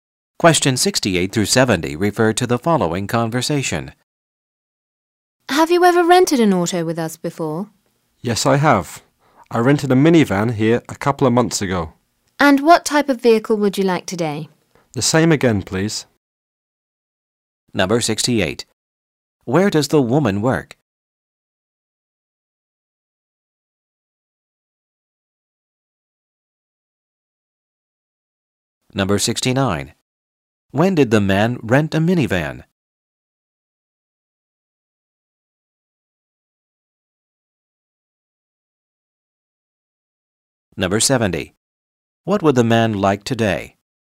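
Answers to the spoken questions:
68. At a car rental agency
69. A couple of months ago
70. A minivan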